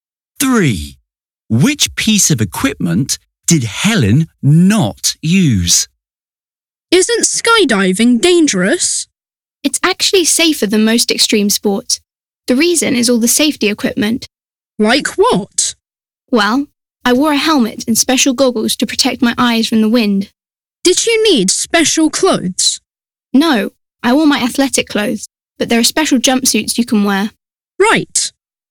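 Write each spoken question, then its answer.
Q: Which piece of equipment did Helen not use?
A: a special jumpsuit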